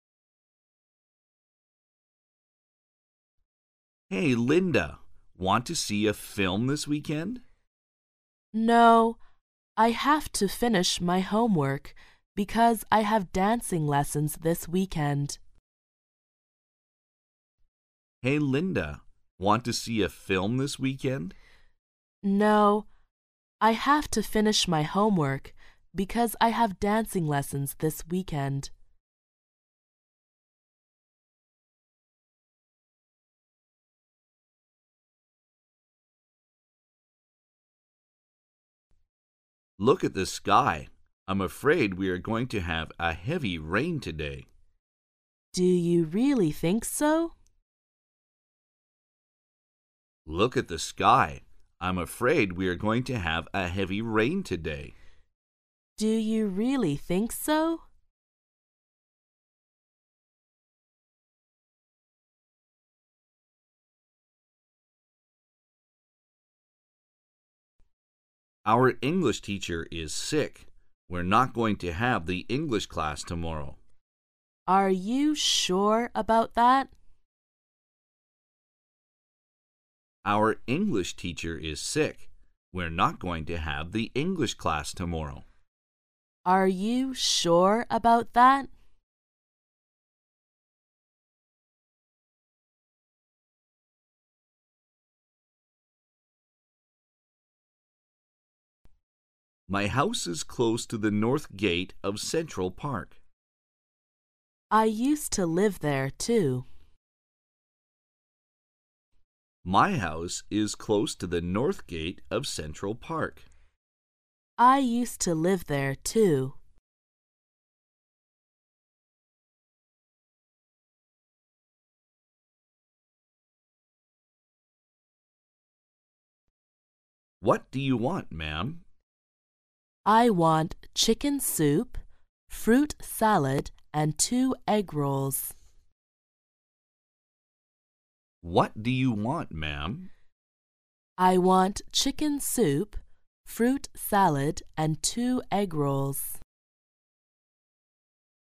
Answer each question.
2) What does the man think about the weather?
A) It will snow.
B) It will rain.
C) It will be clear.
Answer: B) It will rain.

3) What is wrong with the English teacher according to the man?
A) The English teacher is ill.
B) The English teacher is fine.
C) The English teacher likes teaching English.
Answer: A) The English teacher is ill.

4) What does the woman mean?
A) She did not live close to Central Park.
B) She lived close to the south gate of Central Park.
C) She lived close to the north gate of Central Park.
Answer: C) She lived close to the north gate of Central Park.

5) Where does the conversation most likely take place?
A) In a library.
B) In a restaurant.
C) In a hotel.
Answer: B) In a restaurant.

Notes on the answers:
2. [听力原文] M: Look at the sky. I'm afraid we are going to have a heavy rain today. W: Do you really think so? Q: What does the man think about the weather? [句意] 这位男士觉得天气怎样?对话中这位男士说,他恐怕今天会下大雨。故选项[B]正确。
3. [听力原文] M: Our English teacher is sick. We're not going to have the English class tomorrow. W: Are you sure about that? Q: What is wrong with the English teacher according to the man? [句意] 根据这位男士所说的,英语老师怎么了?对话中,这位男士说,英语老师生病了,所以明天的英语课不上了。故选项[A]正确。
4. [听力原文] M: My house is close to the north gate of Central Park. W: I used to live there too. Q: What does the woman mean? [句意] 这位女士什么意思?对话中,男士说,他的家距离中央公园的北门近。女士说,她过去也住在那里。故选项[C]正确。
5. [听力原文] M: What do you want, ma'am? W: I want chicken soup, fruit salad and two egg rolls. Q: Where does the conversation most likely take place? [句意] 这段对话可能发生在哪里?对话中,男士问女士想要什么?女士回答说,她想要鸡汤、水果沙拉和两个蛋卷。因此,从对话我们可以推断出这段对话可能发生在餐馆里。故选项[B]正确。

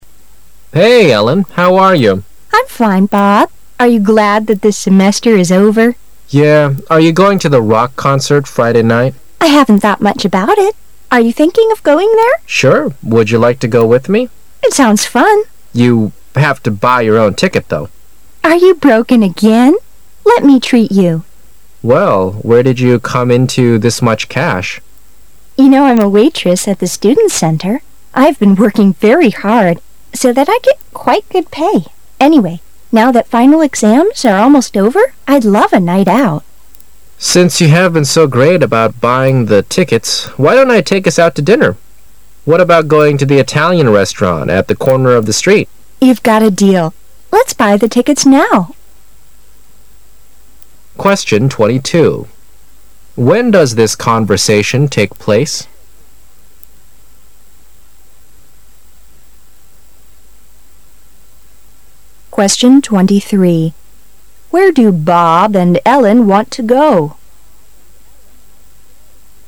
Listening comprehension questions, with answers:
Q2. Where do Bob and Ellen want to go?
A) To a rock and mineral show.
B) To an opera at the concert hall.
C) To a movie at the student center.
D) To a music concert.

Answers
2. D) To a music concert.

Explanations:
事实细节题。选项A)为强干扰项,这里a rock and mineral show 是指"岩石和矿石展览",而对话中说的是rock concert (摇滚乐音乐会),可见他们想去的是音乐会。

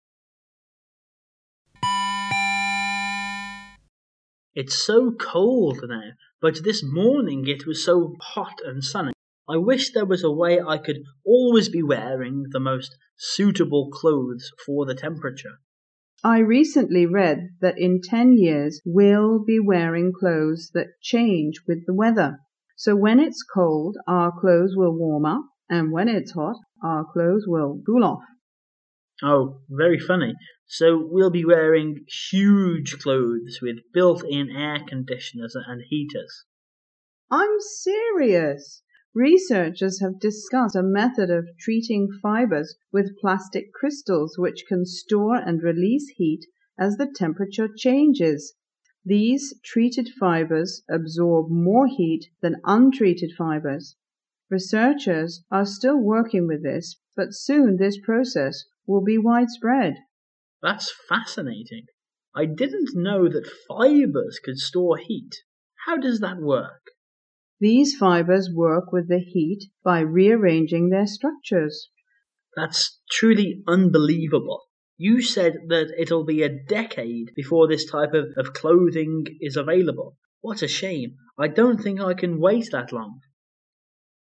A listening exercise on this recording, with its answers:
Questions 11~14 are based on the following dialogue about a new kind of clothes.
What's the man's first reaction to what the woman describes?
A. He is shocked.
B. He is excited.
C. He is upset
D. He is doubtful.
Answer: D. He is doubtful.

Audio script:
[解析] 11-14 M: It's so cold now, but this morning it was so hot and sunny. I wish there was a way I could always be wearing the most suitable clothes for the temperature. W: I recently read that in ten years we'll wearing clothes that changes with the weather. So when it's cold, our clothes will warm up, and when it's hot, our clothes will cool off. M: Oh, very funny. So we'll be wearing huge clothes with built-in air conditioners and heaters? W: I'm serious. Researchers have discovered a method of treating fibers with plastic crystals which can store and release heat as the temperature changes. These treated fibers absorb more heat than untreated fibers. Researchers are still working with this, but soon this process will be widespread. M: That's fascinating. I didn't know that fibers could store heat. How does that work? W: These fibers work with the heat by rearranging their structures. M: That's truly unbelievable. You said that it'll be a decade before this type of clothes will be available. What a shame! I don't think I can wait that long.

